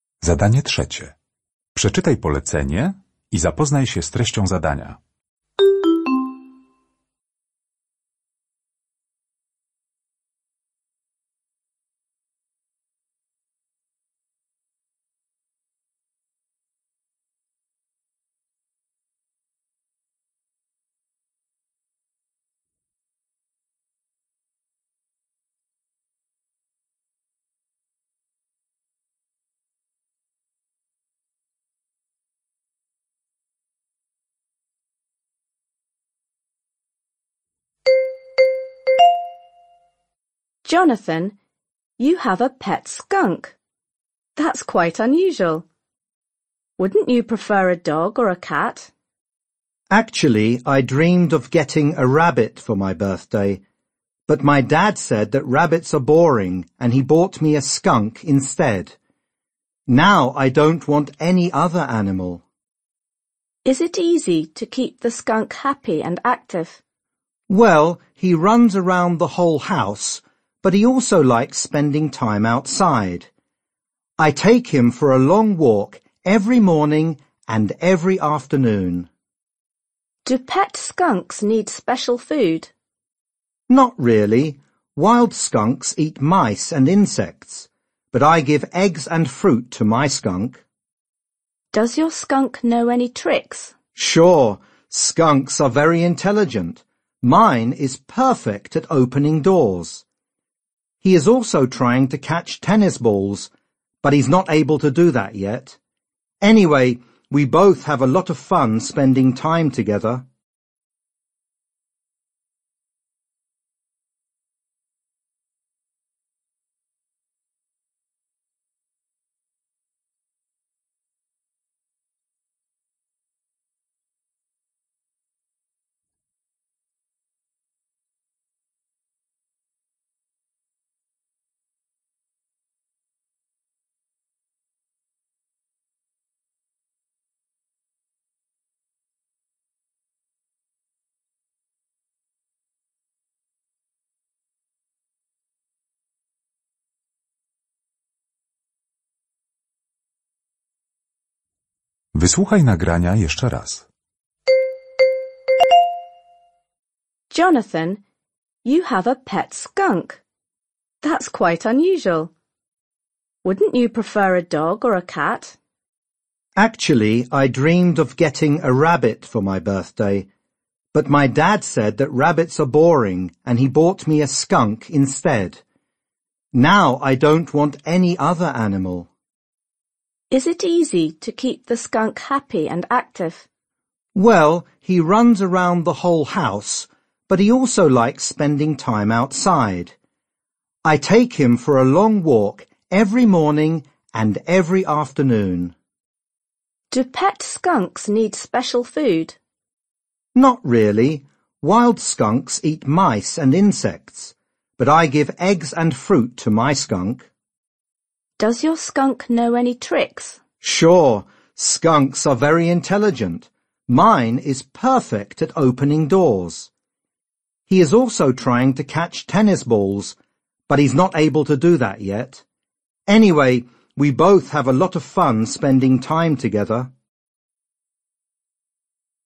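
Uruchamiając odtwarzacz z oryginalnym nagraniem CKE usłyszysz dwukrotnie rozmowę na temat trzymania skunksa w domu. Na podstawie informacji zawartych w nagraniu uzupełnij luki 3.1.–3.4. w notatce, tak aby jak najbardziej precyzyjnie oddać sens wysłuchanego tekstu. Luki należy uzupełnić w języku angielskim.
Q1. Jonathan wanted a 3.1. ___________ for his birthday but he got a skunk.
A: rabbit

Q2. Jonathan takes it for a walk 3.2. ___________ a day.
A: twice

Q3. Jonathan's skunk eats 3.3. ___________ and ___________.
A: eggs and fruit

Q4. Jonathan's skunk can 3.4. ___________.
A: open doors

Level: egzamin ósmoklasisty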